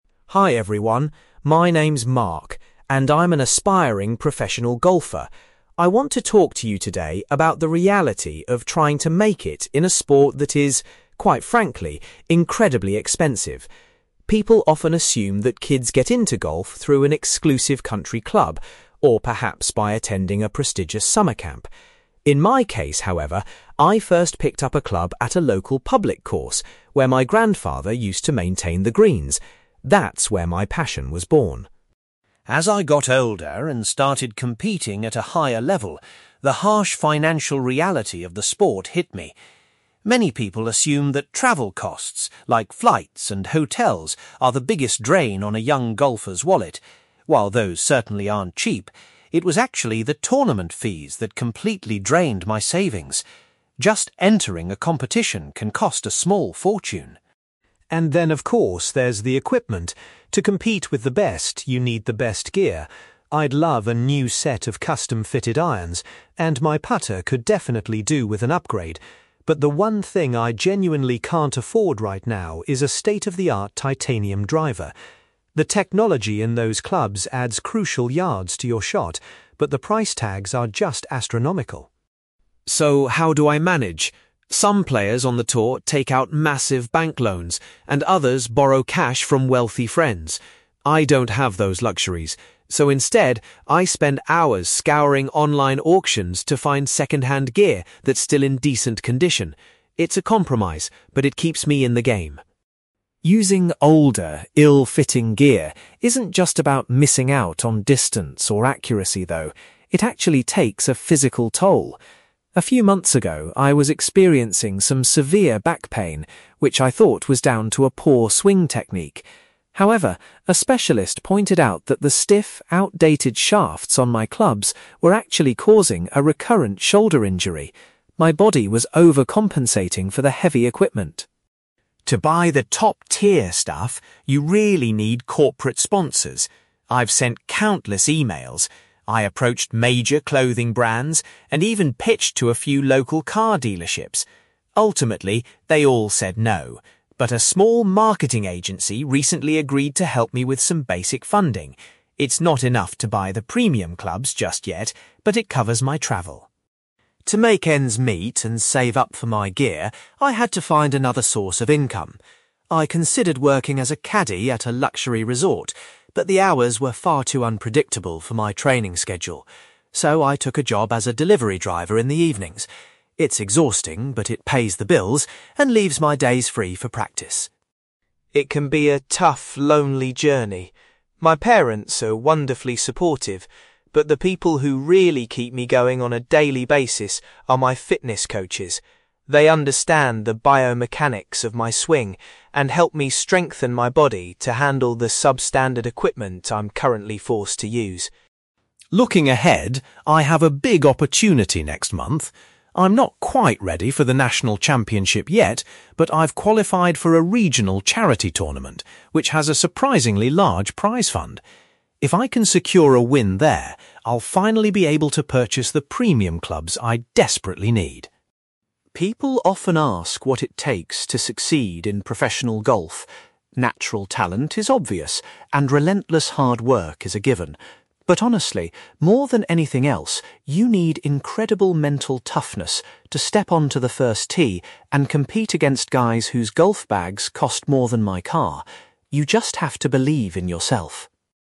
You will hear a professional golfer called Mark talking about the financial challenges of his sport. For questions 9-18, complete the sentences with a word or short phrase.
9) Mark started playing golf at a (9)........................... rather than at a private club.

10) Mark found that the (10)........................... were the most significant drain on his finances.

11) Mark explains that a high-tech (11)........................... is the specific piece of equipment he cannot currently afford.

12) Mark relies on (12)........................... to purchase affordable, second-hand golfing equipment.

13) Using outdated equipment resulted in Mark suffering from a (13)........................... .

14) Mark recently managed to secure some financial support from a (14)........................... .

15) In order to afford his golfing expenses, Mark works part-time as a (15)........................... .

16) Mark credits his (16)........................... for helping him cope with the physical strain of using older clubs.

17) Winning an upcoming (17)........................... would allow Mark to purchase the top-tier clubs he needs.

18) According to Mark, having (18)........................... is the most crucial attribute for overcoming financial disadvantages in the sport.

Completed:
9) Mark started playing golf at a public course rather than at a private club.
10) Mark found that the tournament fees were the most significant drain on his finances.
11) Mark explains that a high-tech titanium driver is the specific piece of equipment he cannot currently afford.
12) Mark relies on online auctions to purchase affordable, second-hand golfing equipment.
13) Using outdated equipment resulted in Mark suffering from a shoulder injury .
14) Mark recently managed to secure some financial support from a marketing agency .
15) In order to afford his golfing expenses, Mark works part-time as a delivery driver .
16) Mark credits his fitness coaches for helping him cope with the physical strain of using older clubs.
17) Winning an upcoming charity tournament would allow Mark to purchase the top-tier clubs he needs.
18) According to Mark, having mental toughness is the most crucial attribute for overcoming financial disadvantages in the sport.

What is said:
Mark: Hi everyone, my name is Mark, and I'm an aspiring professional golfer. I want to talk to you today about the reality of trying to make it in a sport that is, quite frankly, incredibly expensive. People often assume that kids get into golf through an exclusive country club, or perhaps by attending a prestigious summer camp. In my case, however, I first picked up a club at a local public course where my grandfather used to maintain the greens. That's where my passion was born.
As I got older and started competing at a higher level, the harsh financial reality of the sport hit me. Many people assume that travel costs—like flights and hotels—are the biggest drain on a young golfer's wallet. While those certainly aren't cheap, it was actually the tournament fees that completely drained my savings. Just entering a competition can cost a small fortune.
And then, of course, there's the equipment. To compete with the best, you need the best gear. I'd love a new set of custom-fitted irons, and my putter could definitely do with an upgrade. But the one thing I genuinely can't afford right now is a state-of-the-art titanium driver. The technology in those clubs adds crucial yards to your shot, but the price tags are just astronomical.
So, how do I manage? Some players on the tour take out massive bank loans, and others borrow cash from wealthy friends. I don't have those luxuries, so instead, I spend hours scouring online auctions to find second-hand gear that's still in decent condition. It's a compromise, but it keeps me in the game.
Using older, ill-fitting gear isn't just about missing out on distance or accuracy, though. It actually takes a physical toll. A few months ago, I was experiencing some severe back pain, which I thought was down to a poor swing technique. However, a specialist pointed out that the stiff, outdated shafts on my clubs were actually causing a recurrent shoulder injury. My body was overcompensating for the heavy equipment.
To buy the top-tier stuff, you really need corporate sponsors. I've sent countless emails. I approached major clothing brands and even pitched to a few local car dealerships. Ultimately, they all said no, but a small marketing agency recently agreed to help me with some basic funding. It's not enough to buy the premium clubs just yet, but it covers my travel.
To make ends meet and save up for my gear, I had to find another source of income. I considered working as a caddie at a luxury resort, but the hours were far too unpredictable for my training schedule. So, I took a job as a delivery driver in the evenings. It's exhausting, but it pays the bills and leaves my days free for practice.
It can be a tough, lonely journey. My parents are wonderfully supportive, but the people who really keep me going on a daily basis are my fitness coaches. They understand the biomechanics of my swing and help me strengthen my body to handle the sub-standard equipment I'm currently forced to use.
Looking ahead, I have a big opportunity next month. I'm not quite ready for the national championship yet, but I've qualified for a regional charity tournament which has a surprisingly large prize fund. If I can secure a win there, I'll finally be able to purchase the premium clubs I desperately need.
People often ask what it takes to succeed in professional golf. Natural talent is obvious, and relentless hard work is a given. But honestly, more than anything else, you need incredible mental toughness to step onto the first tee and compete against guys whose golf bags cost more than my car. You just have to believe in yourself.

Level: B2